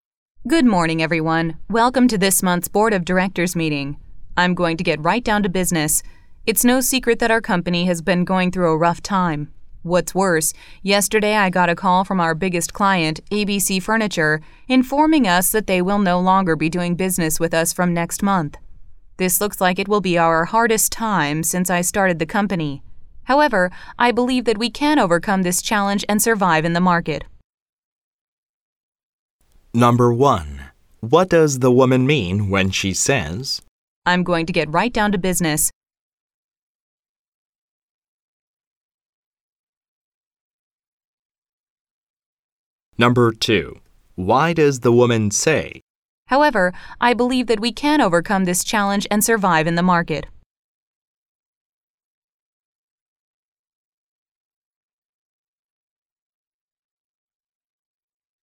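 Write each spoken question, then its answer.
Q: What does the woman mean when she says, I'm going to get right down to business.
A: She will start talking about the main topic right away, without small talk.

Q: Why does the woman say, However, I believe that we can overcome this challenge and survive in the market.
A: To encourage the board and show she is confident the company can get through the crisis.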